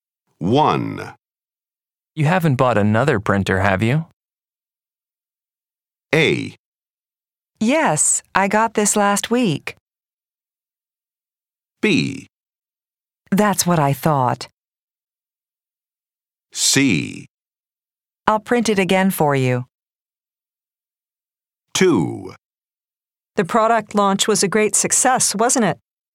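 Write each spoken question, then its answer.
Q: You haven't bought another printer, have you?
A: A: Yes, I got this last week.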